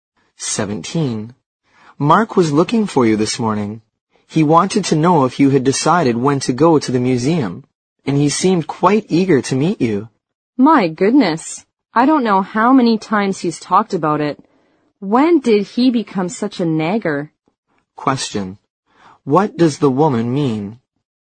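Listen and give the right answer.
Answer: Mark has talked about the museum trip too often; he keeps nagging.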